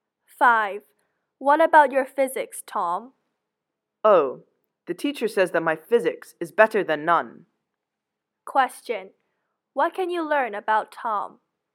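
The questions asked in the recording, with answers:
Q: What can you learn about Tom?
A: He is poor at physics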